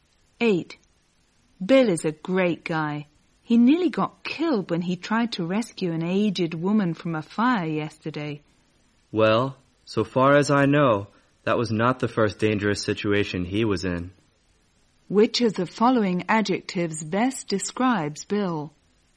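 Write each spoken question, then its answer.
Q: Which of the following adjectives best describes Bill?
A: Brave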